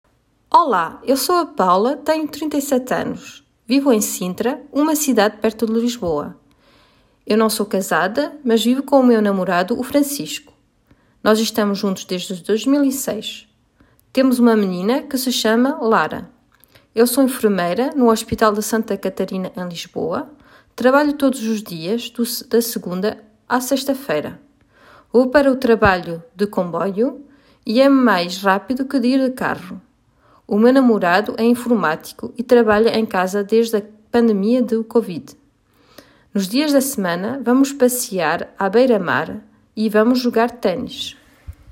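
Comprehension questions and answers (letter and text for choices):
Atividade 3 : Faire correspondre les questions et les réponses ( Ecouter les questions)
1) Ela mora em Sintra.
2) Ela trabalho no hospital Santa Catarina.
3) Eles passam o fim de semana a passear na beira-mar.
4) A personagem chama-se Paula.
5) Não é casada, mas tem um namorado.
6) A profissão do Francisco é informático.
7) Ela tem 37 anos.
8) Não ela trabalha de segunda-feira a sexta-feira.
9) A Paula é enfermeira.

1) Como se chama a personagem principal ?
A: 4) A personagem chama-se Paula.

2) Quantos anos tem ela ?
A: 7) Ela tem 37 anos.

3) Onde mora ?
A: 1) Ela mora em Sintra.

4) É casada ?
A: 5) Não é casada, mas tem um namorado.

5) Qual é a profissão da Paula ?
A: 9) A Paula é enfermeira.

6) Qual é a profissão do Francisco ?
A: 6) A profissão do Francisco é informático.

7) Onde trabalha a Paula ?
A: 2) Ela trabalho no hospital Santa Catarina.

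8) Trabalha todos os dias ?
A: 8) Não ela trabalha de segunda-feira a sexta-feira.

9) O que fazem no fim de semana ?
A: 3) Eles passam o fim de semana a passear na beira-mar.

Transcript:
Olá ! Eu sou a Paula, tenho 37 (trinta e sete) anos. Vivo em Sintra, uma cidade perto de Lisboa. Eu não sou casada mas vivo com o meu namorado o Francisco. Nós estamos juntos desde 2006. Temos uma menina que se chama Lara.
Eu sou enfermeira no Hospital de Santa Catarina em Lisboa, trabalho todos os dias, da segunda à sexta-feira. Vou para o trabalho de comboio, é mais rápido que ir de carro.
O meu namorado é informático e trabalha em casa desde a pandemia da Covid.
Nos fins de semana, vamos passear à beira-mar e vamos jogar ténis.

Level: A1 - Adulte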